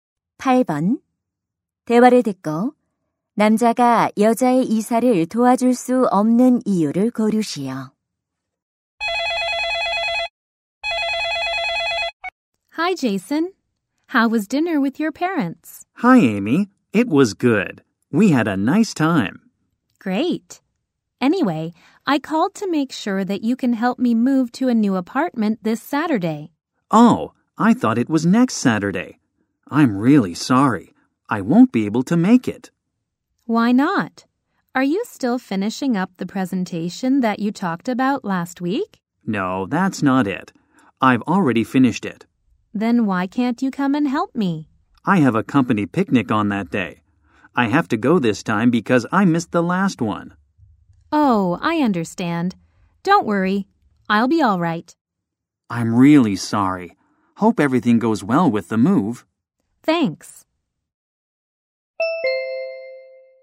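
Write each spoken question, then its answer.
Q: 대화를 듣고 남자가 여자의 이사를 도와줄 수 없는 이유를 고르시오.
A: 회사 야유회에 가야 해서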